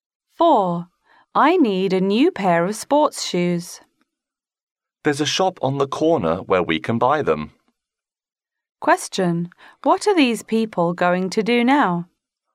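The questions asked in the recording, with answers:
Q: What are these people going to do now?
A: Go to the shop on the corner to buy sports shoes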